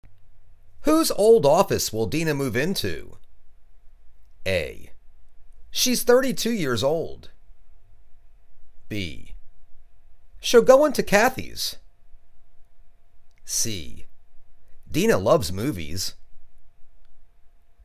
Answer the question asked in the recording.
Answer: She'll go into Kathy's.